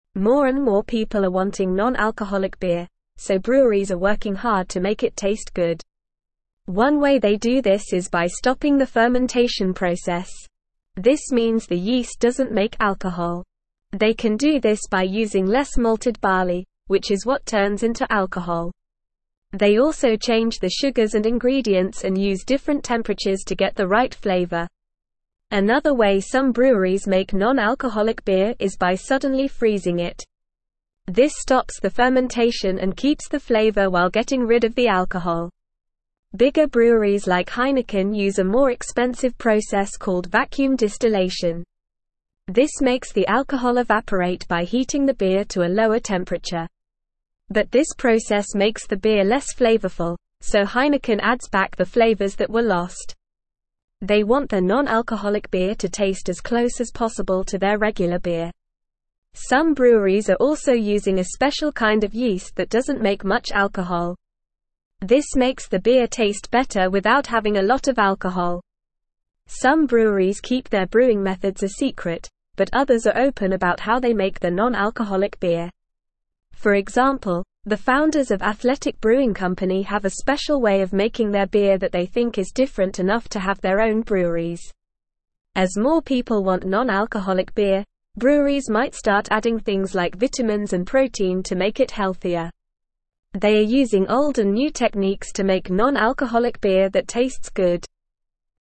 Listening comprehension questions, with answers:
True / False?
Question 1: Some breweries use a special kind of yeast that produces less alcohol, resulting in a better-tasting non-alcoholic beer.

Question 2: Breweries are not exploring the addition of vitamins and protein to non-alcoholic beer to make it healthier as the demand for such beverages decreases.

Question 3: One way to stop fermentation is by using more malted barley, which is what turns into alcohol.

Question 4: Some breweries freeze non-alcoholic beer gradually to stop fermentation and remove the alcohol while preserving the flavor.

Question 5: Heineken adds back the flavors that were lost during vacuum distillation to make their non-alcoholic beer taste as close as possible to their regular beer.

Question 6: Breweries also change the sugars and ingredients and use different temperatures to achieve the right flavor in non-alcoholic beer.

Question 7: Bigger breweries like Heineken use a more expensive process called vacuum distillation to remove alcohol, but this can make the beer less flavorful.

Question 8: Breweries are not working hard to make non-alcoholic beer taste good by stopping the fermentation process.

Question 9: One way they do this is by stopping the fermentation (1)______.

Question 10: They can do this by using less (2)______ barley, which is what turns into alcohol.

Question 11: They also (3)______ the sugars and (4)______ and use different temperatures to get the right flavor.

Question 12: They also (3)______ the sugars and (4)______ and use different temperatures to get the right flavor.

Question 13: Bigger breweries like Heineken use a more (5)______ process (6)______ vacuum (7)______.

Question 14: Bigger breweries like Heineken use a more (5)______ process (6)______ vacuum (7)______.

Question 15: Bigger breweries like Heineken use a more (5)______ process (6)______ vacuum (7)______.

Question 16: This makes the alcohol evaporate by (8)______ the beer to a lower temperature.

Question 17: They want their non-alcoholic beer to taste as close as possible to their (9)______ beer.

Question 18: Some breweries are also (10)______ a special kind of yeast that doesn't make much alcohol.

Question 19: Some breweries keep their (11)______ methods a secret, but (12)______ are open about how they make their non-alcoholic beer.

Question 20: Some breweries keep their (11)______ methods a secret, but (12)______ are open about how they make their non-alcoholic beer.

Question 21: For example, the founders of (13)______ Brewing (14)______ have a special way of making their beer that they think is different enough to have their own breweries.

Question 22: For example, the founders of (13)______ Brewing (14)______ have a special way of making their beer that they think is different enough to have their own breweries.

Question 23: As more (15)______ want non-alcoholic beer, breweries might start (16)______ things like vitamins and protein to make it healthier.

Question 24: As more (15)______ want non-alcoholic beer, breweries might start (16)______ things like vitamins and protein to make it healthier.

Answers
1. True
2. False
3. False
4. False
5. True
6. True
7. True
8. False
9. process
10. malted
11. change
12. ingredients
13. expensive
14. called
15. distillation
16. heating
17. regular
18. using
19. brewing
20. others
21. Athletic
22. Company
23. people
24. adding

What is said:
More and more people are wanting non-alcoholic beer, so breweries are working hard to make it taste good. One way they do this is by stopping the fermentation process. This means the yeast doesn't make alcohol. They can do this by using less malted barley, which is what turns into alcohol. They also change the sugars and ingredients and use different temperatures to get the right flavor. Another way some breweries make non-alcoholic beer is by suddenly freezing it. This stops the fermentation and keeps the flavor while getting rid of the alcohol.
Bigger breweries like Heineken use a more expensive process called vacuum distillation. This makes the alcohol evaporate by heating the beer to a lower temperature. But this process makes the beer less flavorful, so Heineken adds back the flavors that were lost. They want their non-alcoholic beer to taste as close as possible to their regular beer.
Some breweries are also using a special kind of yeast that doesn't make much alcohol. This makes the beer taste better without having a lot of alcohol. Some breweries keep their brewing methods a secret, but others are open about how they make their non-alcoholic beer. For example, the founders of Athletic Brewing Company have a special way of making their beer that they think is different enough to have their own breweries.
As more people want non-alcoholic beer, breweries might start adding things like vitamins and protein to make it healthier. They are using old and new techniques to make non-alcoholic beer that tastes good.

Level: Level 3